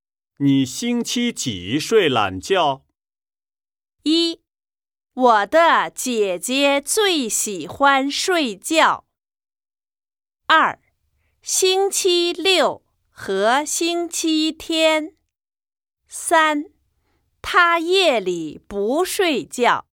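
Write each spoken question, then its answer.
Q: 你星期几睡懒觉?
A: 二: 星期六和星期天。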